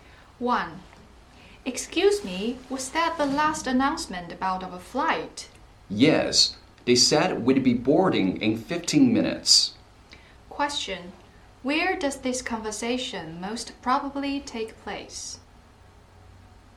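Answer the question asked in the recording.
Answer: At an airport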